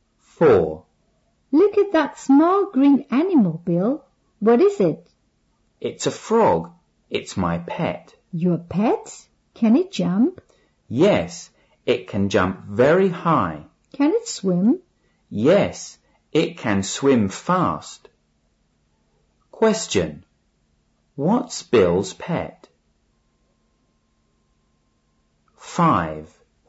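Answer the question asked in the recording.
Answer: A frog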